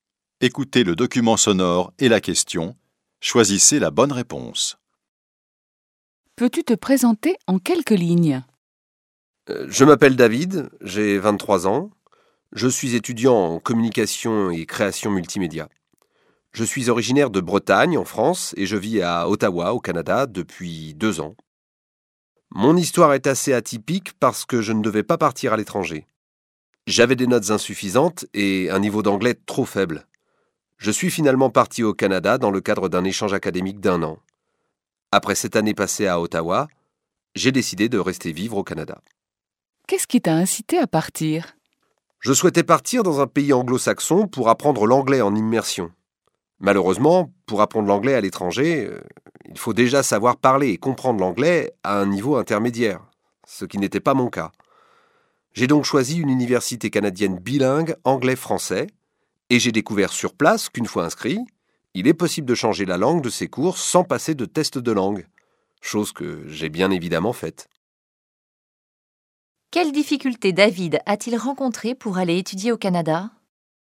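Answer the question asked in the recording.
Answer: Il avait des notes insuffisantes et un niveau d'anglais trop faible.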